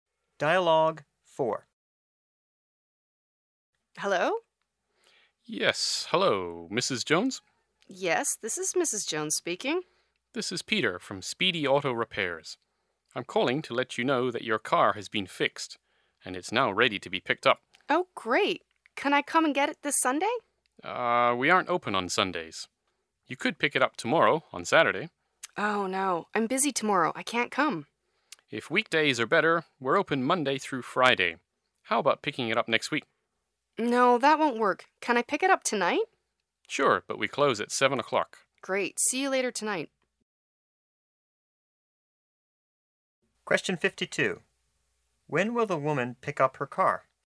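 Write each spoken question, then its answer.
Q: When will the woman pick up her car?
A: Tonight, before 7 o'clock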